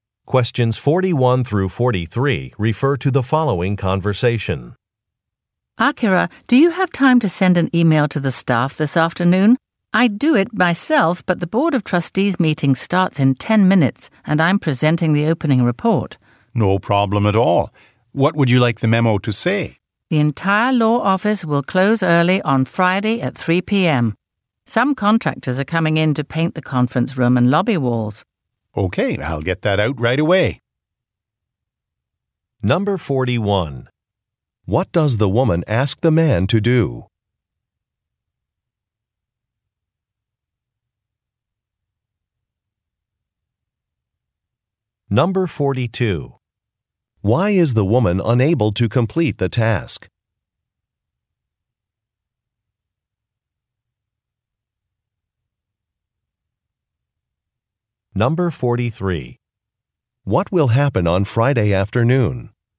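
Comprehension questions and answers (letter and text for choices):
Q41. What does the woman ask the man to do?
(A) Send an e-mail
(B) Revise a report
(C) Schedule a repair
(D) Hang a painting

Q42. Why is the woman unable to complete the task?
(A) She has a computer problem.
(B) She has to consult with a coworker.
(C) She has to give a presentation.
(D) She has a business trip.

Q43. What will happen on Friday afternoon?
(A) Some furniture will be installed.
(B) Some walls will be painted.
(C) A conference will begin.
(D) A luncheon will take place.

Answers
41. (A) Send an e-mail
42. (C) She has to give a presentation.
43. (B) Some walls will be painted.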